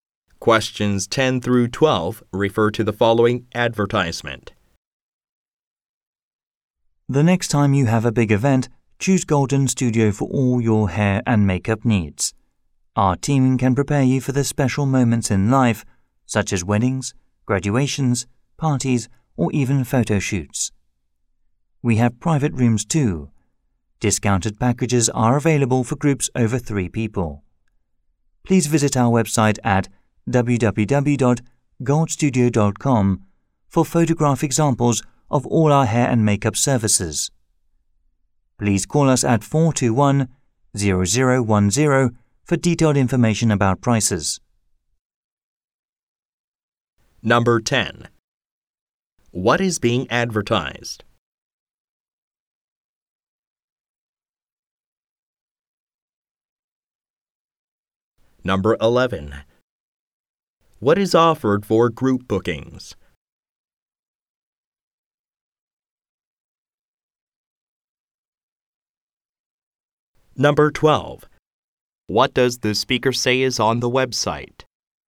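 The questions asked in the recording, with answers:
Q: What is being advertised?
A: A hair and makeup studio

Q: What is offered for group bookings?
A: Discounted packages

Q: What does the speaker say is on the website?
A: Photo examples of hair and makeup services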